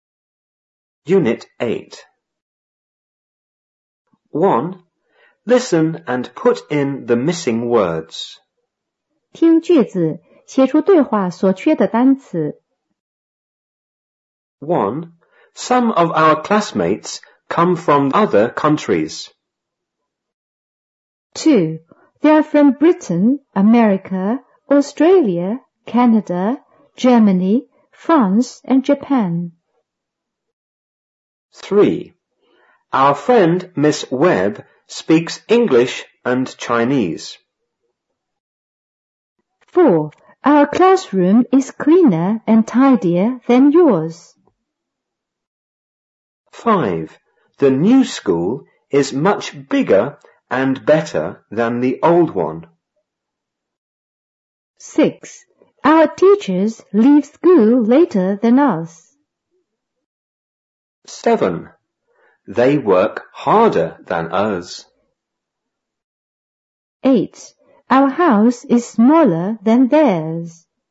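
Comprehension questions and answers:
1.Listen and put in the missing words.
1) Some of our____come from the other____.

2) They are from____,_____,Australia,Canada,Germany,France and____.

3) Our____Miss Webb____English and Chinese.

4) Our classroom is____and tidier_____yours.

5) The new school is much_____and____than the old one.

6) Our teachers____school____than us.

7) They work____than____.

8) Our house is_____than_____.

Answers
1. classmates; countries
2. Britain; America; Japan
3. friend; speaks
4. cleaner; than
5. bigger; better
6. leave; later
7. harder; us
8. smaller; theirs

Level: 五年级下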